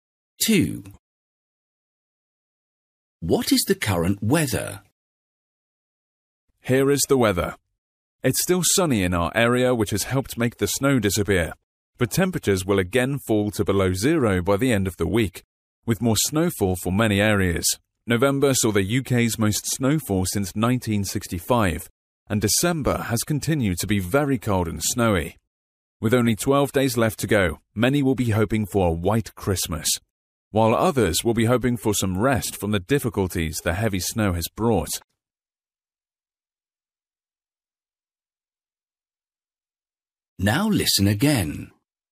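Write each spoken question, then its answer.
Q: What is the current weather?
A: Sunny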